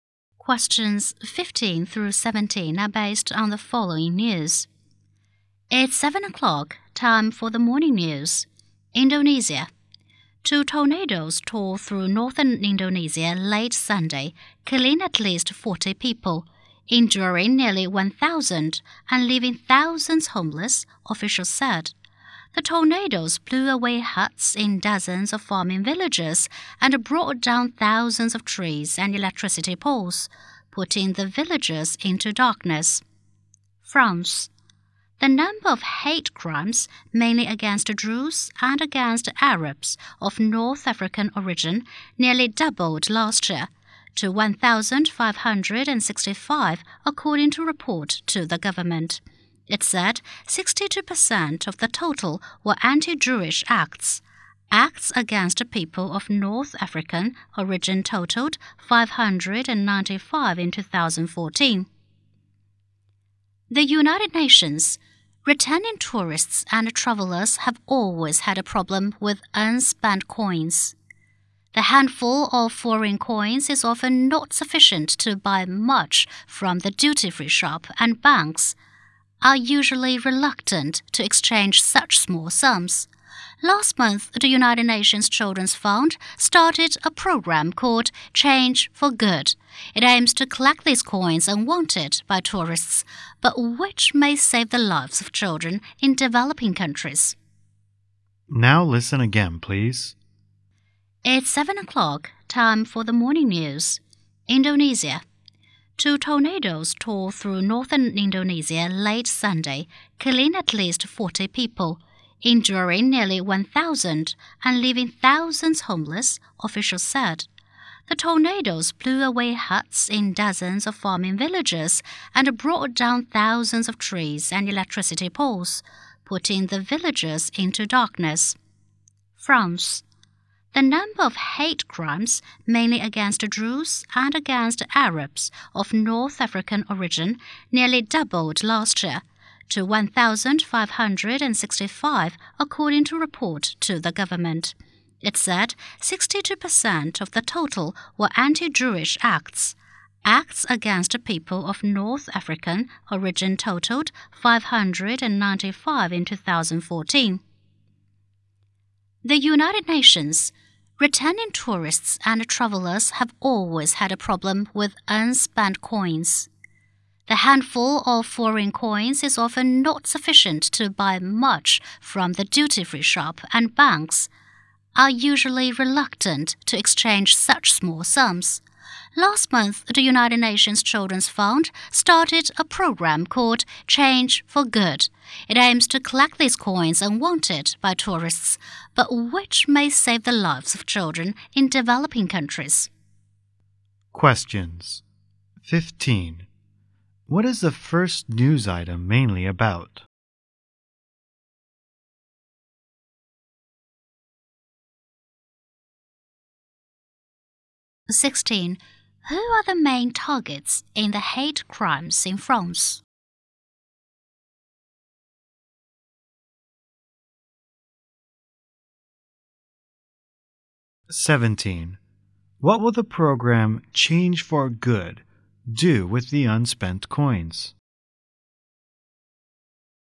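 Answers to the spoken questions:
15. Tornadoes in Indonesia
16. Jews and Arabs of North African origin
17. Use them to save children's lives in developing countries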